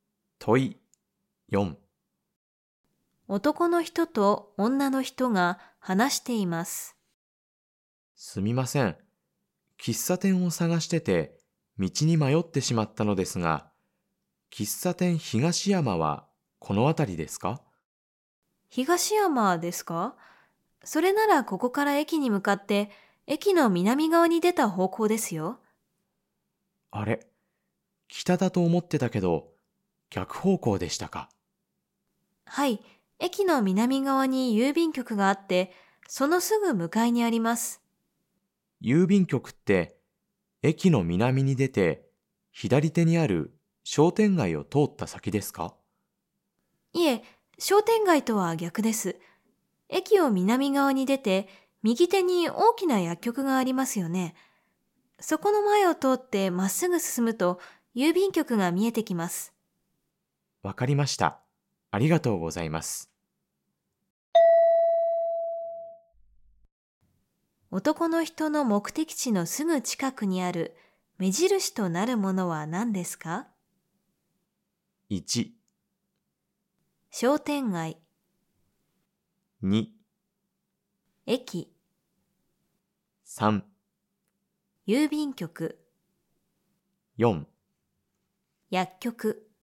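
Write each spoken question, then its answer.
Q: 男の人の目的地のすぐ近くにある目印となるものは何ですか?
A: 3: 郵便局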